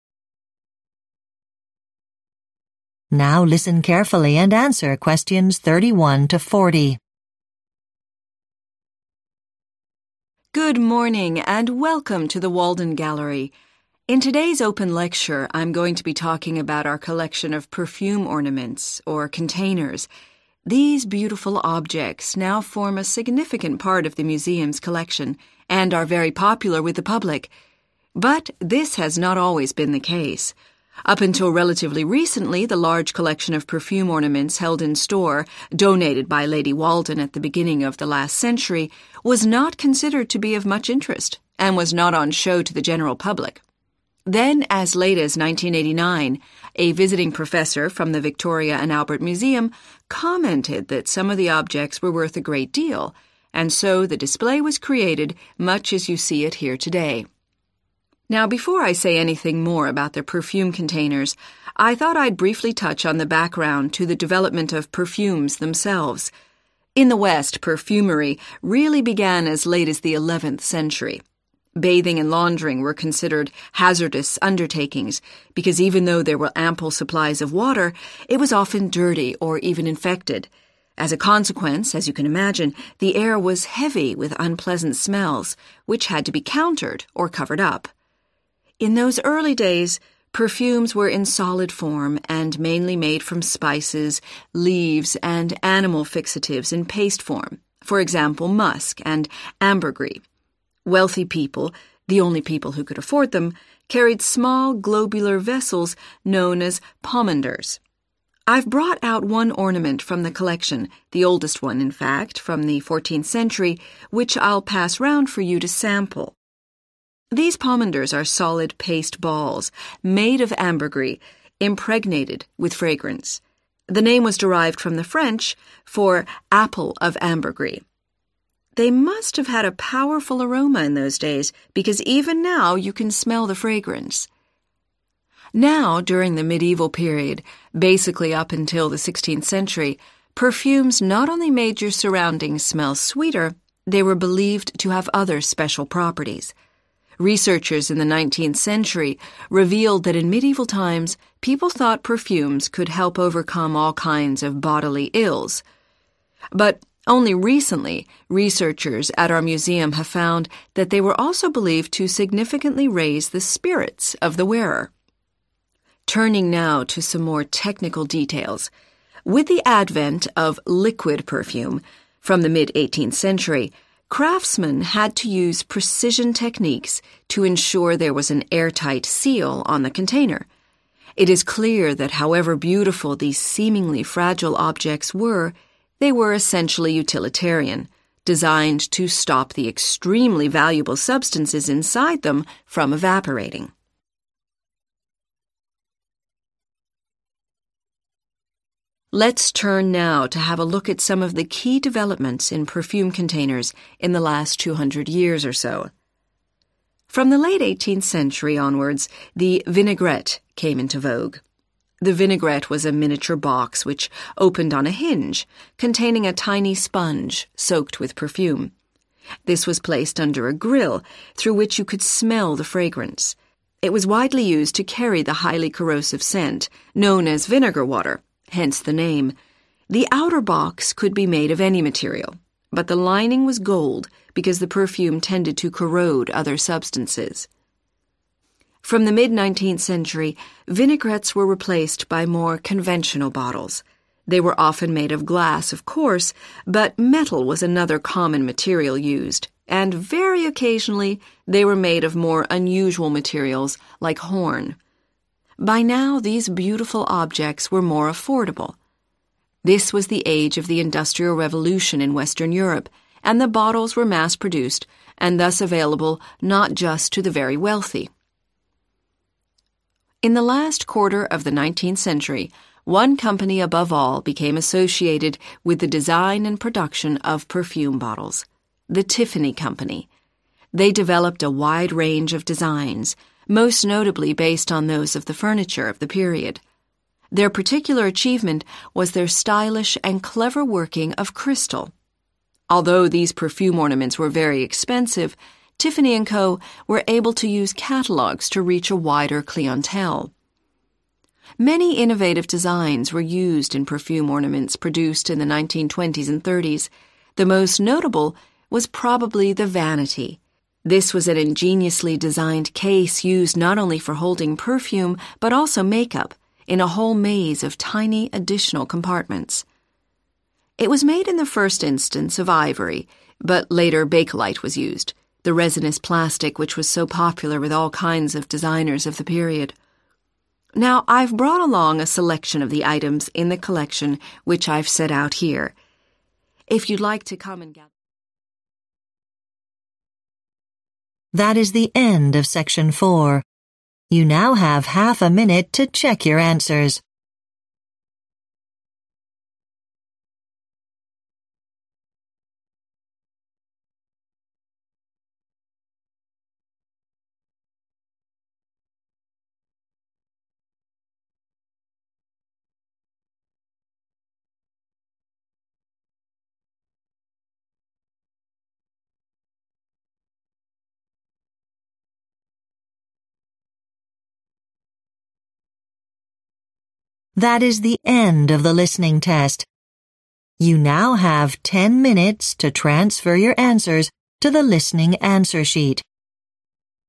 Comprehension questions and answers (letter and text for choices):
Choose the correct letter, A, B or C.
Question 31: The museum started displaying perfume ornaments when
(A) a collection was donated.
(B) the public showed an interest in them.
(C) an expert decided some of them were valuable.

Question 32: People needed to wear perfume in the 11th century because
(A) washing was considered dangerous.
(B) soap was not generally available.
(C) water shortages were common.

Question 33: The perfume ornament known as a 'pomander' took its name from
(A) the substance it was made of.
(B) the liquid inside it.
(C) the person who invented it.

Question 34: In medieval times, it was thought that wearing perfume made people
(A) more wealthy.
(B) more attractive.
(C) more cheerful.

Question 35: Craftsmen found ways of preventing liquid perfume from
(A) being spilled.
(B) drying up.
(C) losing its scent.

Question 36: The perfume in a vinaigrette was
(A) preserved in solid form.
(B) absorbed by a sponge.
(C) heated over a flame.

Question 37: Which part of the vinaigrette was made of gold?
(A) the inside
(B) the outside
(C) the lid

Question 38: Perfume bottles used in the mid-19th century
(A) were imports from outside Europe.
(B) could be bought by large numbers of people.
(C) were usually made of horn.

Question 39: Tiffany bottles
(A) were produced by a number of companies.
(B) could only be bought from catalogues.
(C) showed skilled use of crystal.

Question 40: The 'Vanity' was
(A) used for storing cosmetics.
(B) the smallest perfume ornament ever made.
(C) developed in the 1950s.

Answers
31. (C) an expert decided some of them were valuable.
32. (A) washing was considered dangerous.
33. (A) the substance it was made of.
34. (C) more cheerful.
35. (B) drying up.
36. (B) absorbed by a sponge.
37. (A) the inside
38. (B) could be bought by large numbers of people.
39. (C) showed skilled use of crystal.
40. (A) used for storing cosmetics.